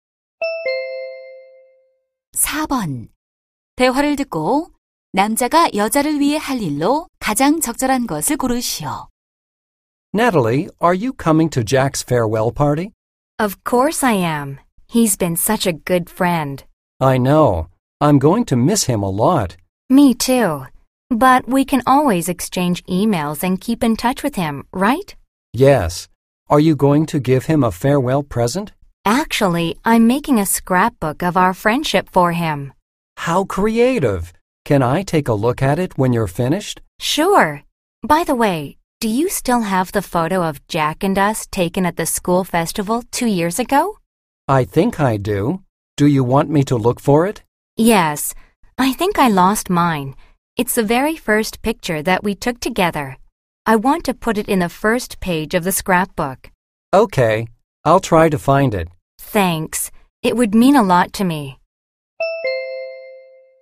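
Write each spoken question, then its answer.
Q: 대화를 듣고 남자가 여자를 위해 할 일로 가장 적절한 것을 고르시오.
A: 학교 축제 때 찍은 사진 찾기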